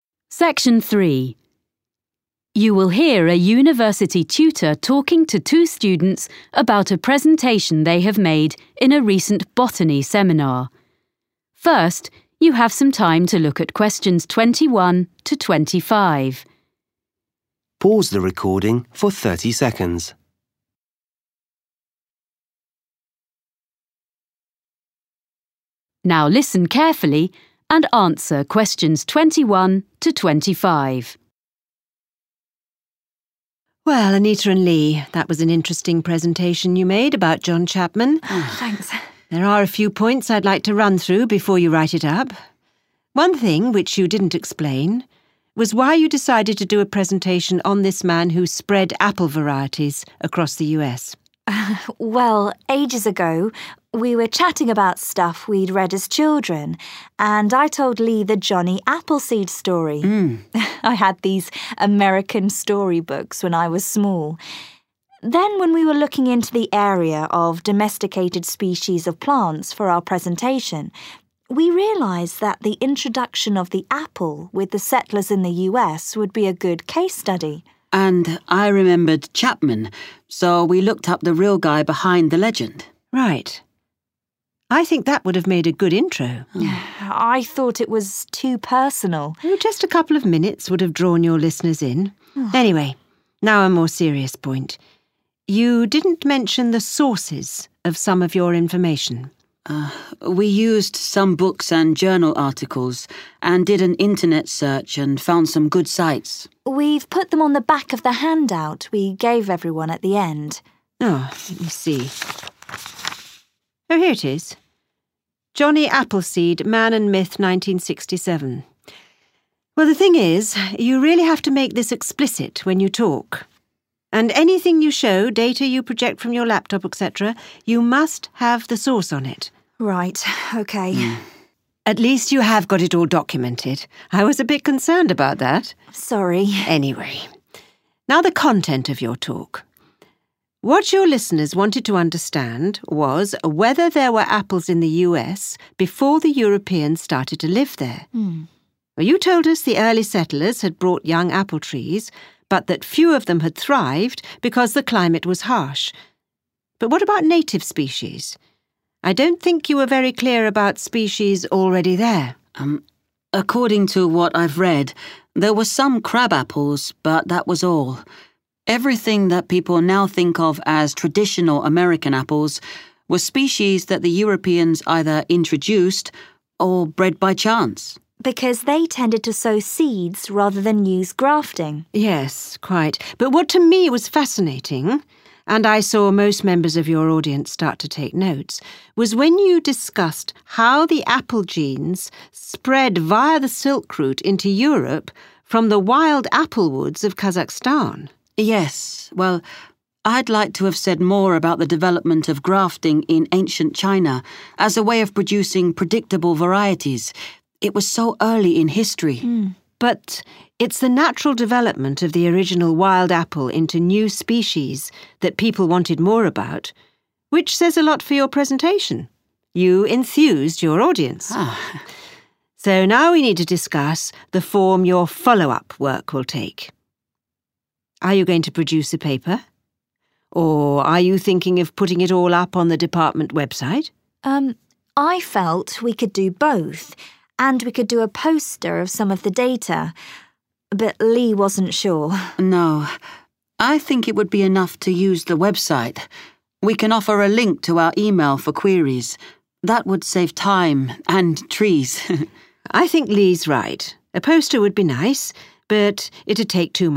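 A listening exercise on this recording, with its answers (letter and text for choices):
Questions 21-25. Choose the correct letter, A, B or C.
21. Why did Anita and Lee choose to talk about John Chapman?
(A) He was Lee's childhood hero.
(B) They wanted to talk about the USA.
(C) He was relevant to the topic of their studies.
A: (C) He was relevant to the topic of their studies.

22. Where did the students record their sources of information?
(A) on their laptops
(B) on a handout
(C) on a database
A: (B) on a handout

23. The tutor claims she does not understand whether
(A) apples grew in America before Europeans arrived.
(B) the Native Americans had always eaten apples.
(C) American apples were first bred in Europe.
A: (A) apples grew in America before Europeans arrived.

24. The tutor says the audience was particularly interested to hear about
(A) grafting techniques in ancient China.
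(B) the cultivation of apples in Kazakhstan.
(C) the spread of apples along the Silk Route.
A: (C) the spread of apples along the Silk Route.

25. How will Anita and Lee present their follow-up work?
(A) on the department website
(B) as a paper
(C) as a poster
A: (A) on the department website

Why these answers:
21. Tutor: One thing which you didn't explain was why you decided to do a presentation on this man who spread apple varieties across the US? (Một điều mà bạn chưa giải thích là lý do tại sao bạn lại quyết định thuyết trình về người đàn ông đã trồng giống táo này trên khắp nước Mỹ?) Anita: Well, ages ago, we were chatting about stuff we'd read as children, and I told Lee the Johnny Appleseed story – I had these American story books when I was small. Then when we were looking into the area of domesticated species of plants for our presentation, we realised that the introduction of the apple with the settlers in the US would be a good case study. 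(Sau đó, khi chúng tôi nghiên cứu về các giống cây thuần chủng cho bài thuyết trình, chúng tôi đã nhận ra rằng việc giới thiệu về táo và những người định cư ở Mỹ (bao gồm cả John Chapman) là một case study tốt.)
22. Anita: We've put them on the back of the handout we gave everyone at the end. (Chúng tôi đã ghi chúng ở mặt sau của tài liệu mà chúng tôi đã phát cho mọi người lúc cuối giờ.)
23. Tutor: What your listeners wanted to understand was whether there were apples in the US before the Europeans started to live there. (Điều mà người nghe muốn hiểu rõ là việc liệu có phải táo có ở Mỹ trước khi người châu Âu bắt đầu sinh sống ở đó hay không.) ... I don't think you were very clear about species already there. (Tôi không nghĩ rằng bạn đã hiểu rất rõ về các giống táo ở đó.)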